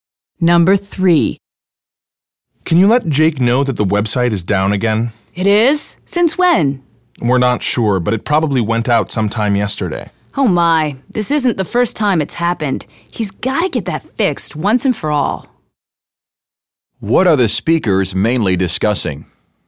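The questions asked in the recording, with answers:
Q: What are the speakers mainly discussing?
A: The website being down again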